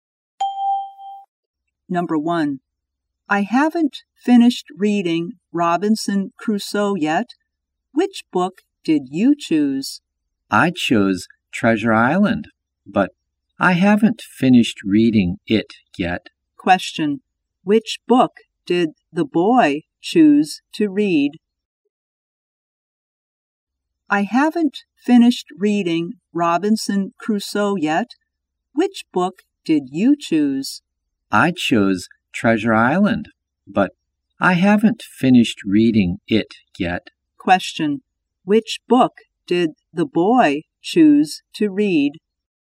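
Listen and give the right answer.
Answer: Treasure Island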